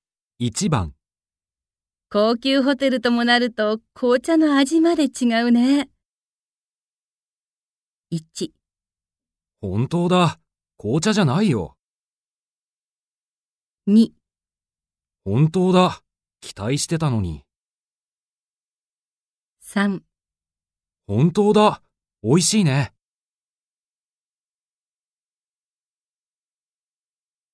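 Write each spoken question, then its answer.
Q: 高級ホテルともなると紅茶の味まで違うね。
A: 3: 本当だ。美味しいね。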